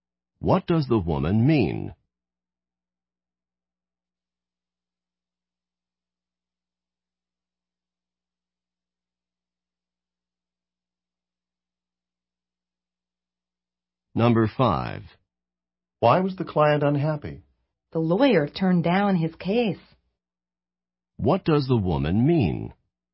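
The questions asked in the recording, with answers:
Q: What does the woman mean?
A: The lawyer refused to take his case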